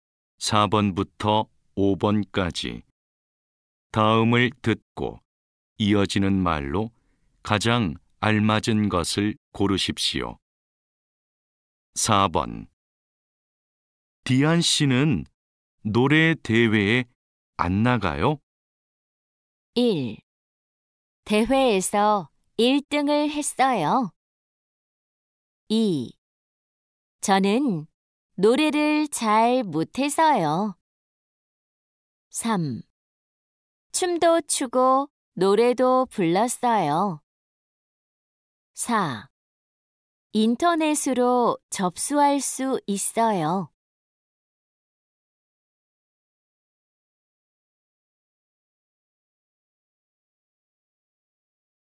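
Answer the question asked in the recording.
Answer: 2: 저는 노래를 잘 못해서요.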